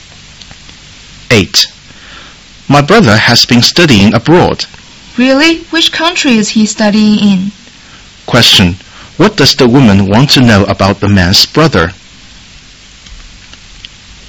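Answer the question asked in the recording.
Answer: Which country he is studying in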